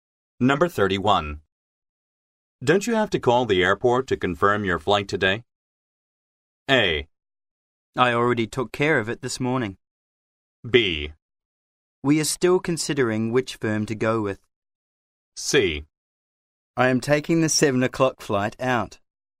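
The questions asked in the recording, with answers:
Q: Don't you have to call the airport to confirm your flight today?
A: A: I already took care of it this morning.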